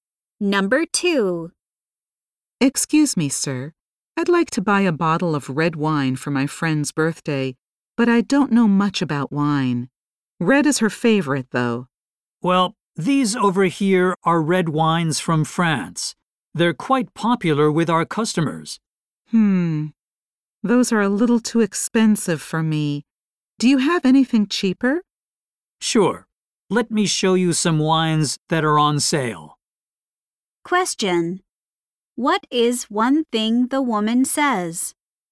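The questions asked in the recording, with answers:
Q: What is one thing the woman says?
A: The French red wines are too expensive for her.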